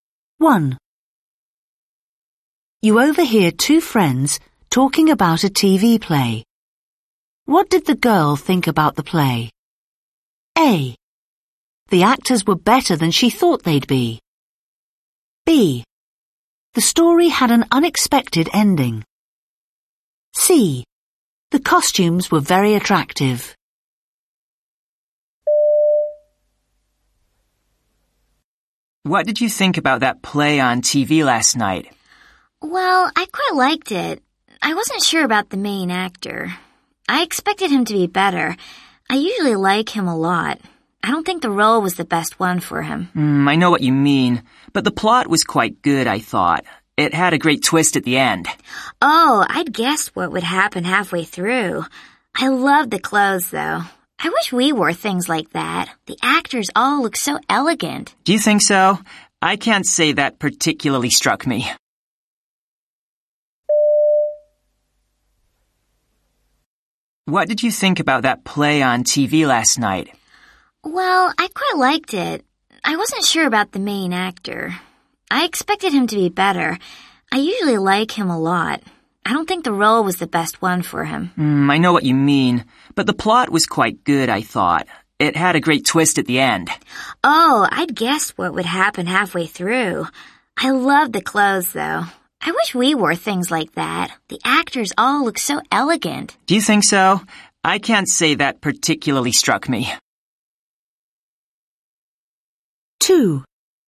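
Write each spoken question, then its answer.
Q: What did the girl think about the play?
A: C: The costumes were very attractive.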